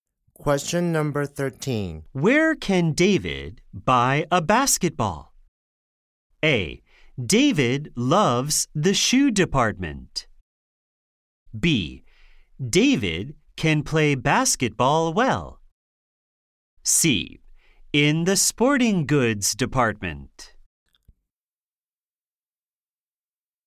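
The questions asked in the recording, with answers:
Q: Where can David buy a basketball?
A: C: In the sporting goods department.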